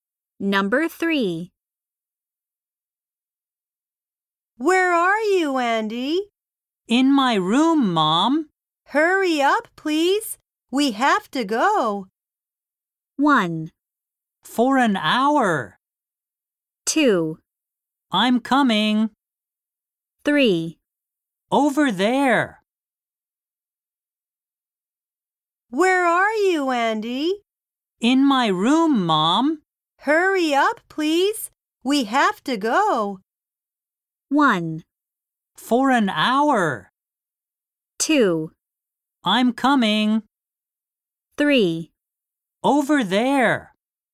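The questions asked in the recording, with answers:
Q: Hurry up, please. We have to go.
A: 2: I'm coming.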